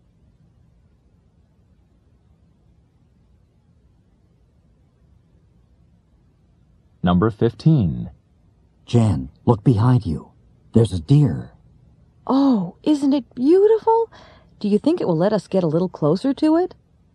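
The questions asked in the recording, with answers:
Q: What does Jan ask the man?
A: Whether the deer will let them get closer to it.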